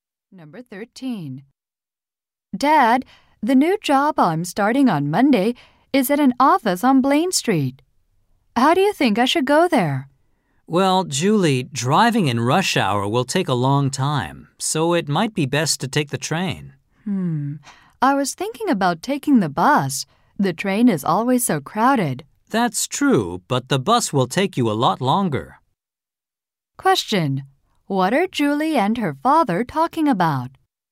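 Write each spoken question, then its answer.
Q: What are Julie and her father talking about?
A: How Julie should get to her new job.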